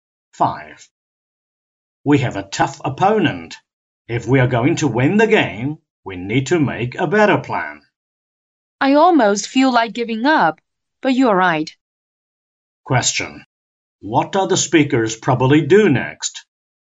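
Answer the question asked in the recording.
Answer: Make a better plan for the game.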